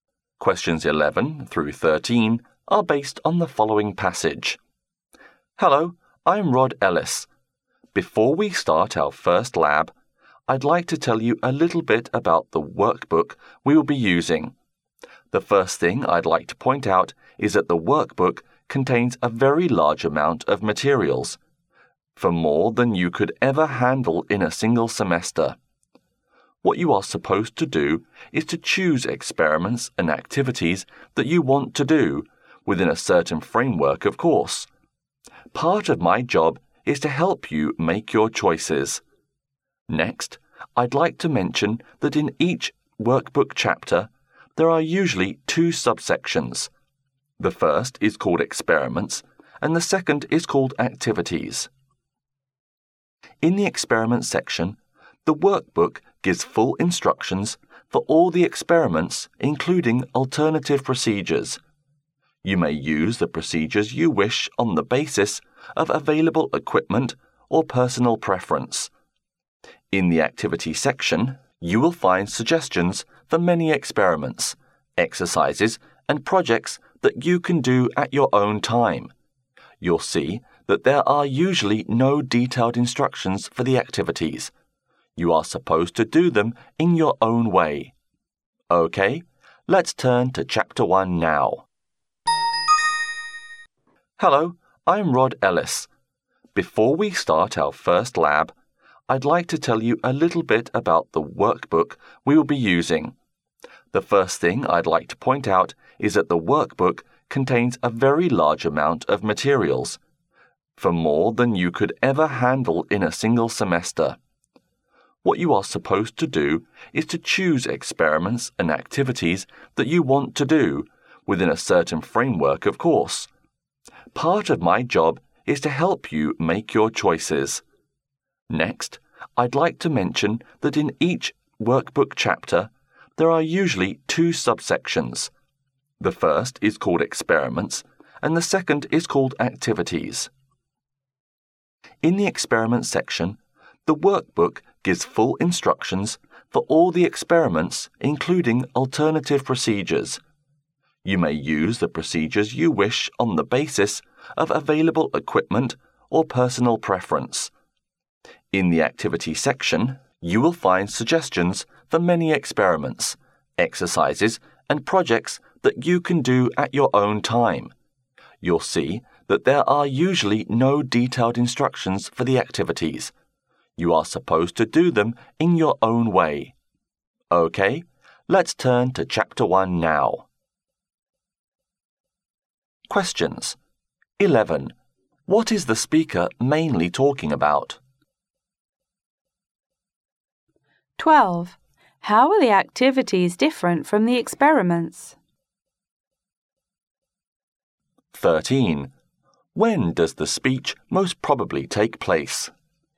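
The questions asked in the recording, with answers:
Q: What is the speaker mainly talking about?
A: The workbook for the lab course

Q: How are the activities different from the experiments?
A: They have no detailed instructions; students do them their own way

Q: When does the speech most probably take place?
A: Before the first lab at the start of the course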